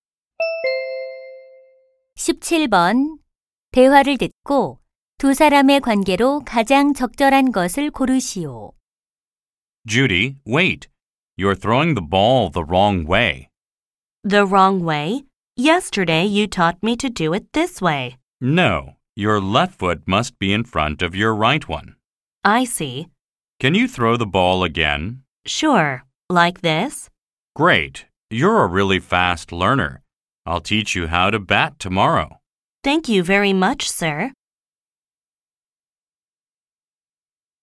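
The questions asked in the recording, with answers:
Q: 대화를 듣고 두 사람의 관계로 가장 적절한 것을 고르시오.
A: 코치와 선수 (야구)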